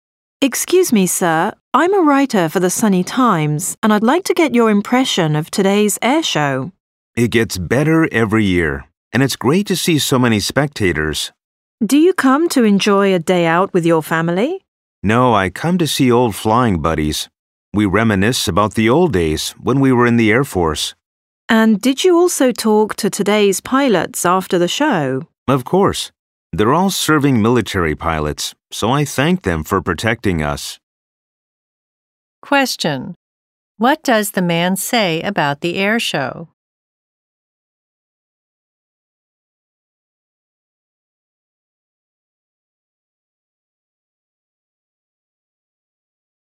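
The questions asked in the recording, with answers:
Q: What does the man say about the air show?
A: It gets better every year, and it's great to see so many spectators.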